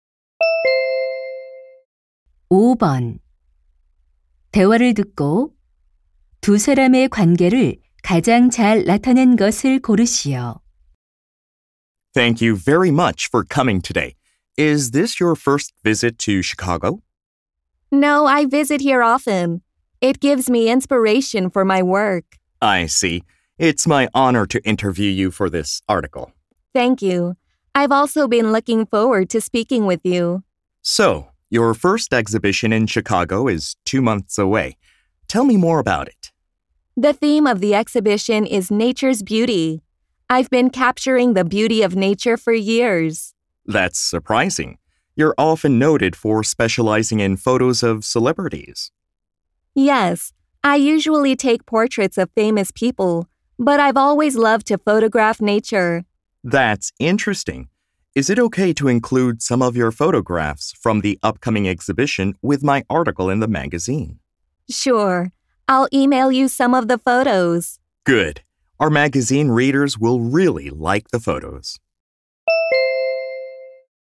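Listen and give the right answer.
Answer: 잡지 기자 - 사진작가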